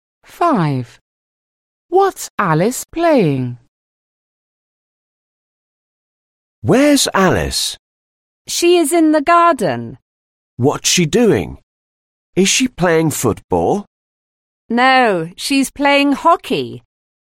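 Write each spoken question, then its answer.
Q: What's Alice playing?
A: Hockey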